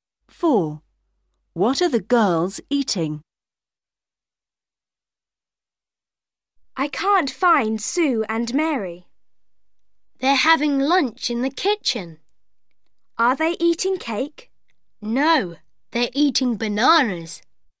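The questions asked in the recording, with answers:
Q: What are the girls eating?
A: Bananas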